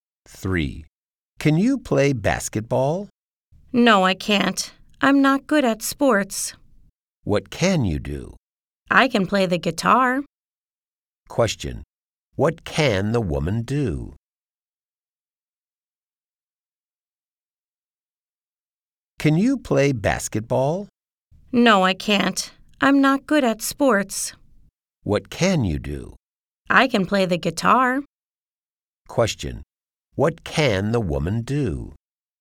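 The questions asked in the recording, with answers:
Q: What can the woman do?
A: She can play the guitar.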